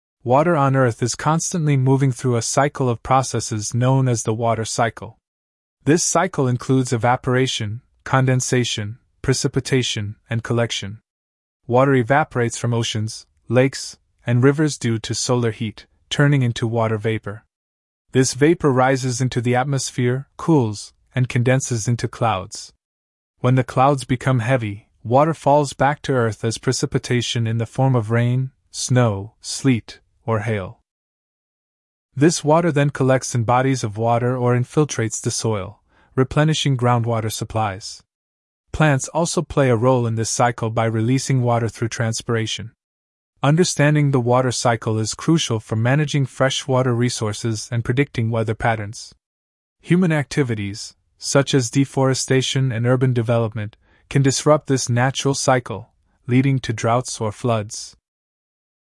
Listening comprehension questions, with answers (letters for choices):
Listen to an academic talk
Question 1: What is the main topic of the talk?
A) Weather forecasting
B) The water cycle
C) Ocean currents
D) Climate change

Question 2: What is the first step in the water cycle mentioned?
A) Precipitation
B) Evaporation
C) Collection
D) Condensation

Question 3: How can humans affect the water cycle?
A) By planting trees only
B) Through deforestation and urban development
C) By fishing in rivers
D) Through evaporation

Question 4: What can be inferred about plants in the water cycle?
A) They have no effect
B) They contribute through transpiration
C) They increase rainfall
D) They prevent evaporation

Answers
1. B
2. B
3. B
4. B

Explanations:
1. The talk explains the processes of the water cycle and its importance.
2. Water evaporates first due to solar heat.
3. Human activities can disrupt natural water flow.
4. Plants release water into the atmosphere, aiding the cycle.

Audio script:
Water on Earth is constantly moving through a cycle of processes known as the water cycle. This cycle includes evaporation, condensation, precipitation, and collection. Water evaporates from oceans, lakes, and rivers due to solar heat, turning into water vapor. This vapor rises into the atmosphere, cools, and condenses into clouds.
When the clouds become heavy, water falls back to Earth as precipitation in the form of rain, snow, sleet, or hail. This water then collects in bodies of water or infiltrates the soil, replenishing groundwater supplies. Plants also play a role in this cycle by releasing water through transpiration.
Understanding the water cycle is crucial for managing freshwater resources and predicting weather patterns. Human activities, such as deforestation and urban development, can disrupt this natural cycle, leading to droughts or floods.